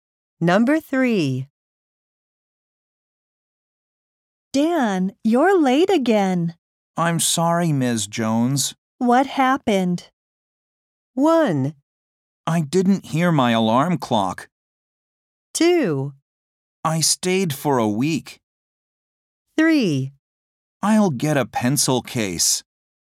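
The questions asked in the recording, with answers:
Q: What happened?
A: 1: I didn't hear my alarm clock.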